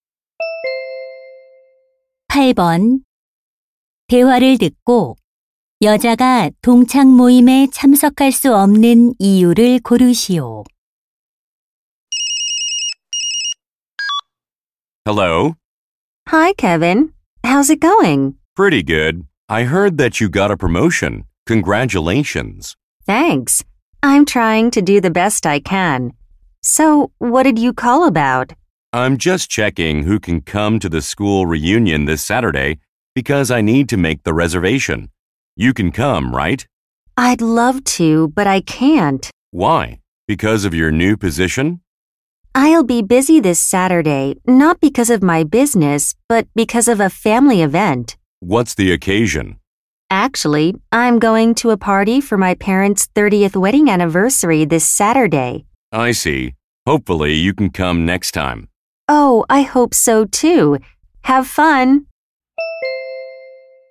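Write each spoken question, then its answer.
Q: 8번대화를듣고여자가동창모임에참석할수없는이유를고르시오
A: 부모님 결혼 30주년 기념 파티에 가야 해서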